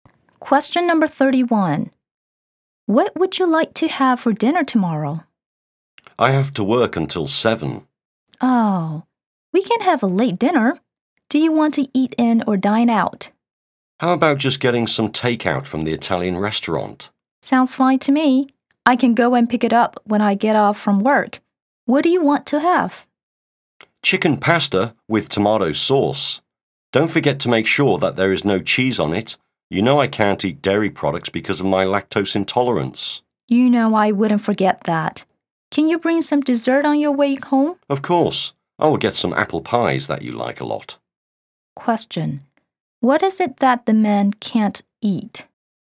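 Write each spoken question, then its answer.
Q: What is it that the man can't eat?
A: Dairy products, such as cheese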